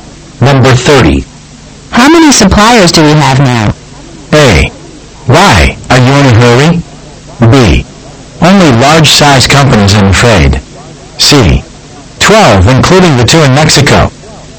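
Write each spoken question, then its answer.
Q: How many suppliers do we have now?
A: C: 12, including the two in Mexico.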